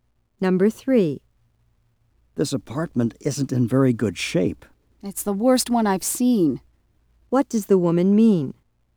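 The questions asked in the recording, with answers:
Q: What does the woman mean?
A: The apartment is in the worst condition of any she has seen.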